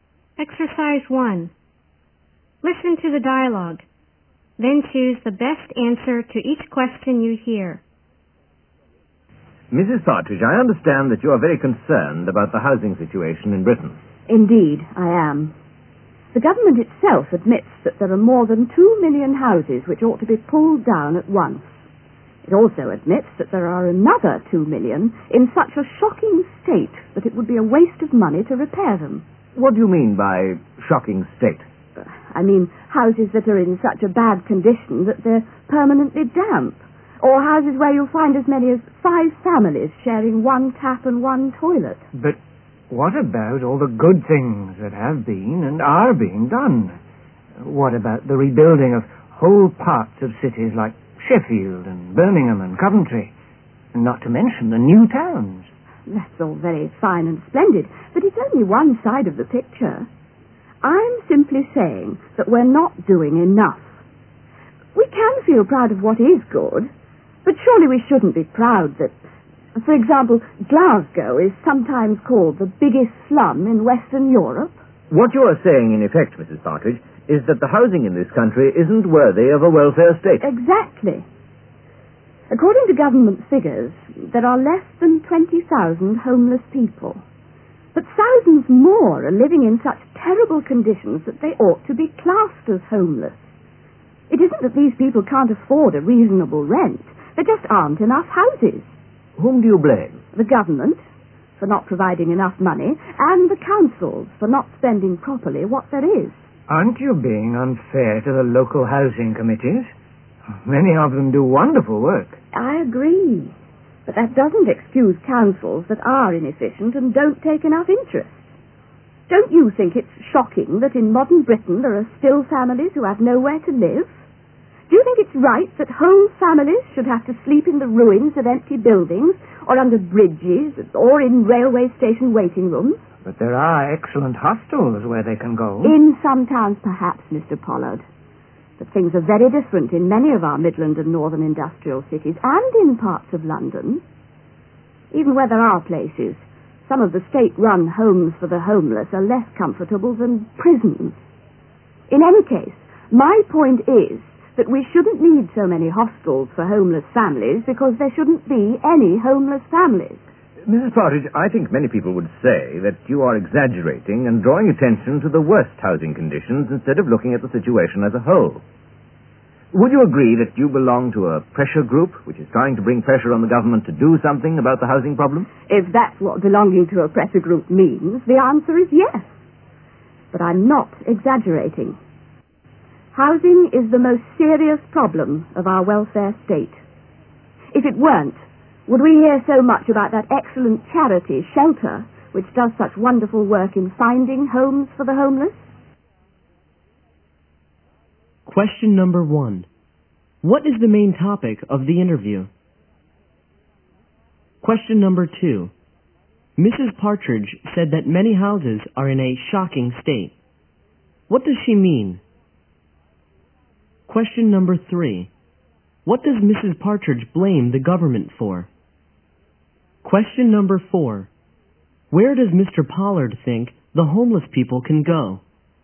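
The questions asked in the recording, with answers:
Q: What is the main topic of the interview?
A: The housing problem in Britain

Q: Mrs. Partridge said that many houses are in a shocking state. What does she mean?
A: Houses so bad they are permanently damp, or where as many as 5 families share one tap and one toilet

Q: What does Mrs. Partridge blame the government for?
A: For not providing enough money

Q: Where does Mr. Pollard think the homeless people can go?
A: To hostels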